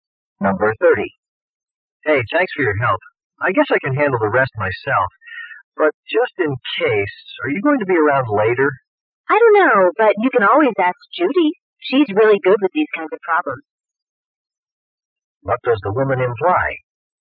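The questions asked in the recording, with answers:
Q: What does the woman imply?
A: Judy can help him if he has problems.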